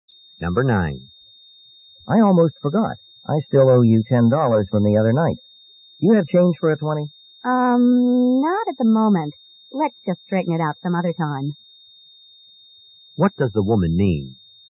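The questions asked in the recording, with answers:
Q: What does the woman mean?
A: The man can pay her back some other time.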